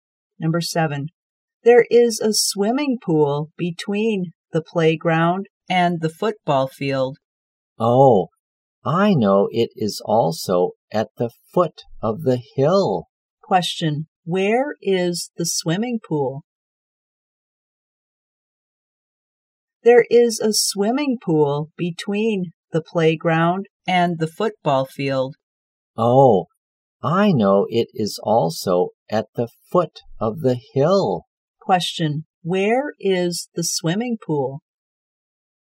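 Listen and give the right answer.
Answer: Between the playground and the football field, at the foot of the hill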